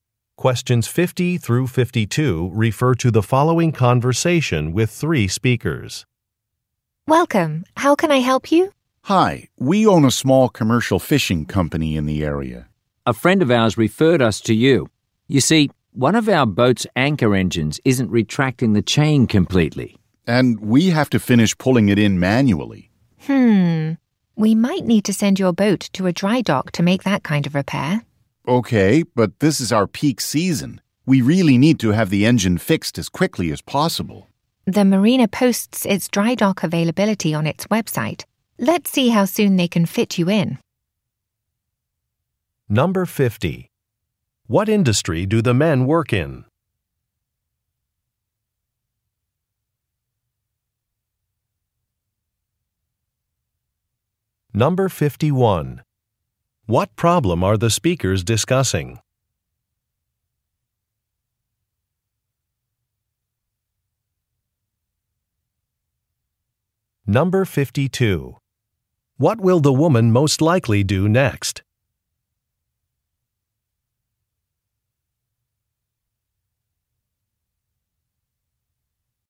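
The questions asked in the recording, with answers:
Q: What industry do the men work in?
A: Commercial fishing

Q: What problem are the speakers discussing?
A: A boat's anchor engine isn't retracting the chain completely

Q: What will the woman most likely do next?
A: Check the marina's website for dry dock availability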